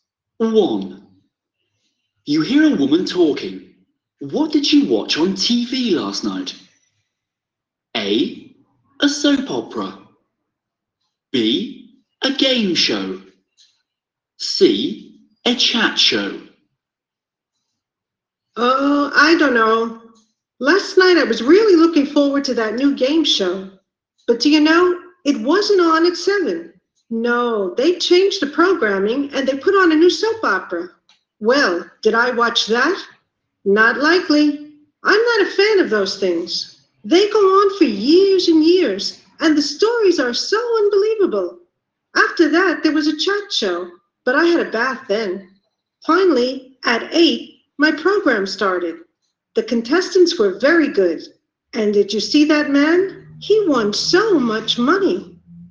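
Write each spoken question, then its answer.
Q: What did you watch on TV last night?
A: B: a game show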